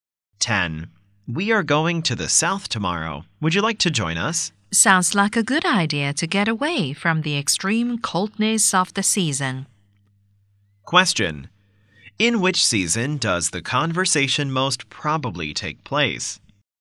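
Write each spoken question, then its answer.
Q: In which season does the conversation most probably take place?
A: Winter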